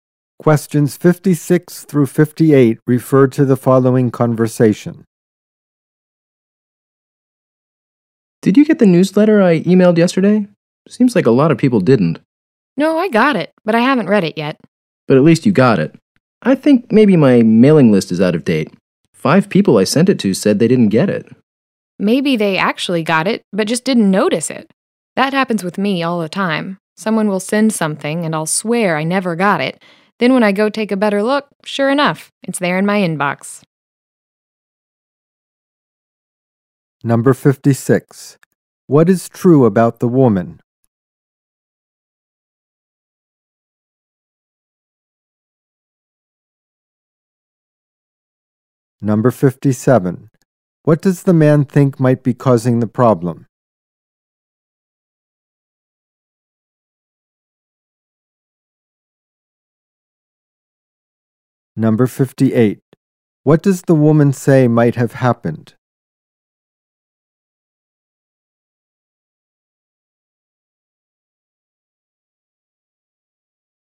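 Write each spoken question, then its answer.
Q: What does the man think might be causing the problem?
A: His mailing list is out of date

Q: What does the woman say might have happened?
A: People got the newsletter but didn't notice it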